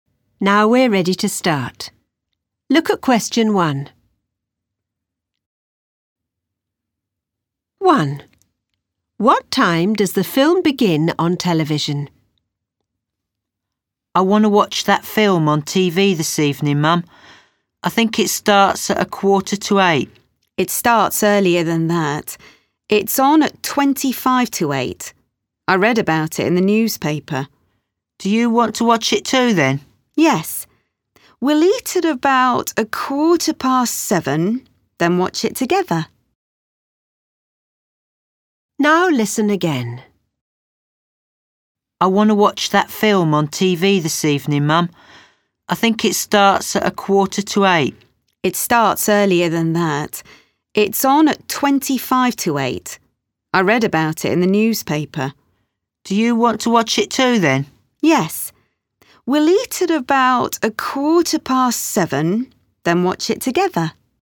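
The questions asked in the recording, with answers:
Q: What time does the film begin on television?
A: 7:25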